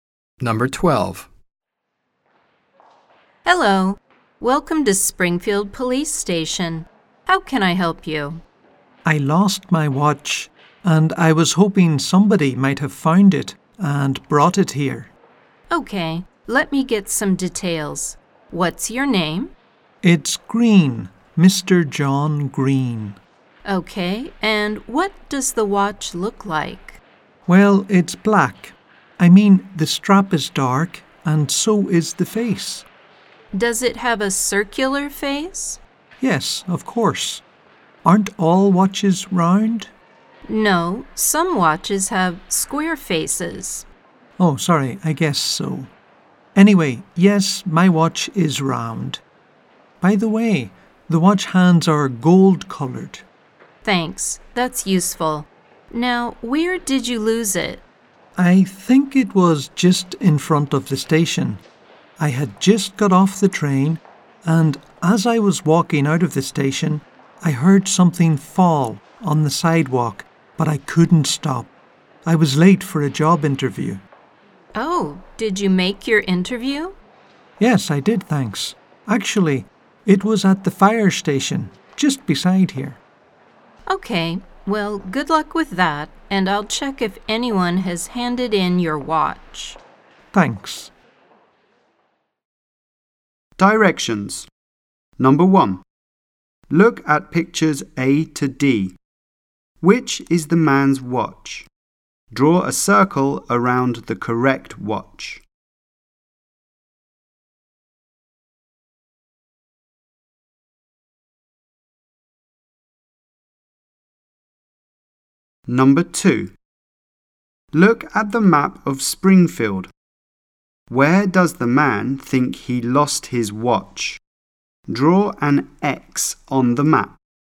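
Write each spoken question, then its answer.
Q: Where does the man think he lost his watch?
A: Just in front of the train station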